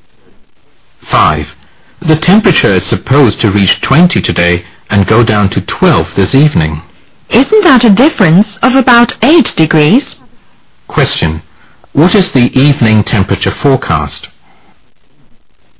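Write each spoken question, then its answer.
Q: What is the evening temperature forecast?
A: 12 degrees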